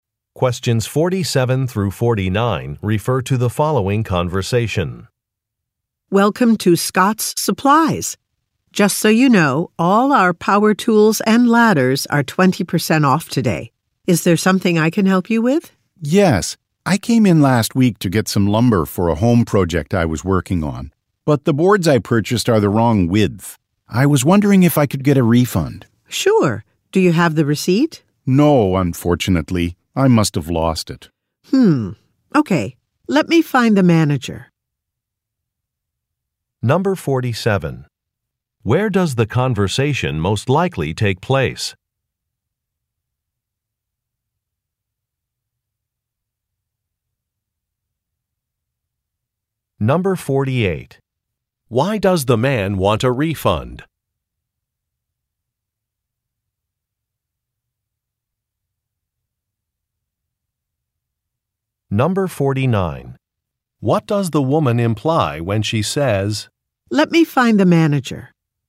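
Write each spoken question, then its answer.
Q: Where does the conversation most likely take place?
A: At a hardware store

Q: Why does the man want a refund?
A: The boards he bought are the wrong width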